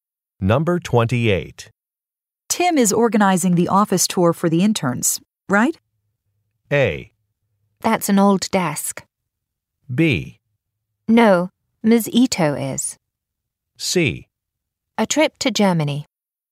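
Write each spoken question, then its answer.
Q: Tim is organizing the office tour for the interns, right?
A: B: No, Ms. Ito is.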